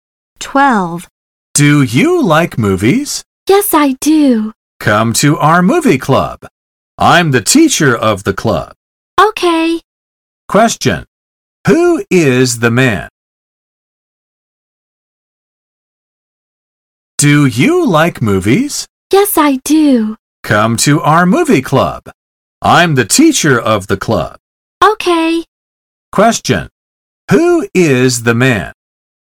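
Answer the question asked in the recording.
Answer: The teacher of the movie club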